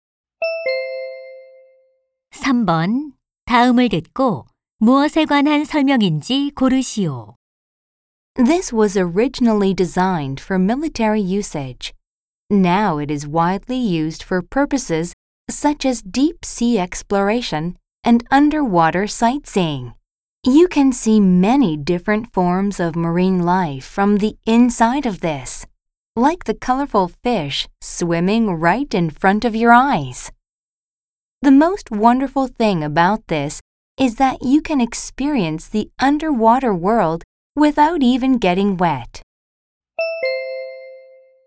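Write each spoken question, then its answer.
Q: 다음을 듣고 무엇에 관한 설명인지 고르시오.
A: 잠수함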